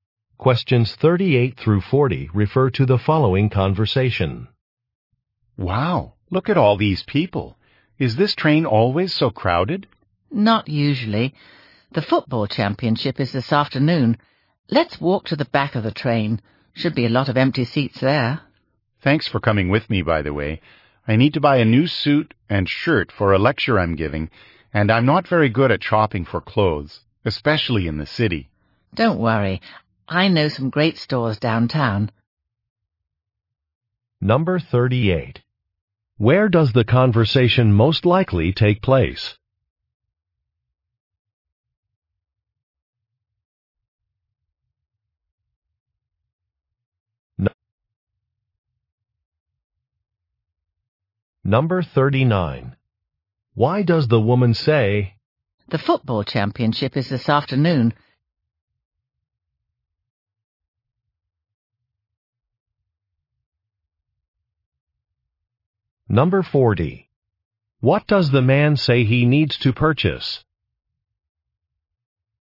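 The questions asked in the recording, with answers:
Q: Where does the conversation most likely take place?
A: On a train

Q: Why does the woman say,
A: To explain why the train is crowded

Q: What does the man say he needs to purchase?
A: A new suit and shirt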